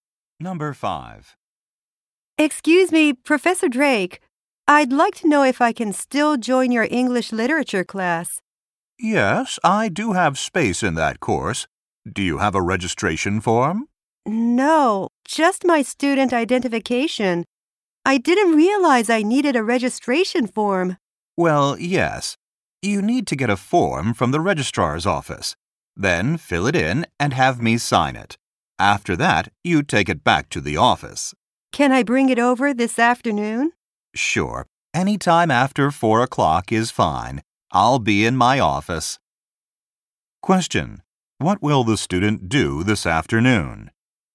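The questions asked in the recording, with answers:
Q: What will the student do this afternoon?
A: Bring the filled-in registration form to the professor's office after 4 o'clock.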